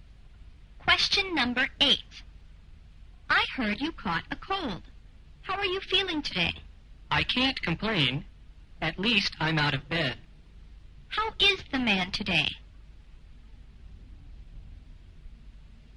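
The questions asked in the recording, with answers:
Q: How is the man today?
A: Better, out of bed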